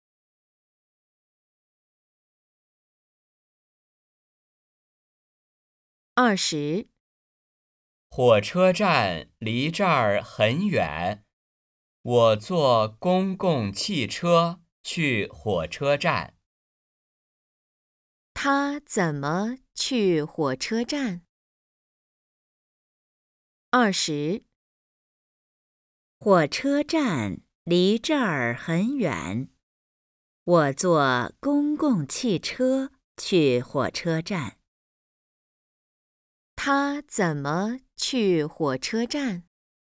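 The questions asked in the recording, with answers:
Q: 他怎么去火车站?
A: 坐公共汽车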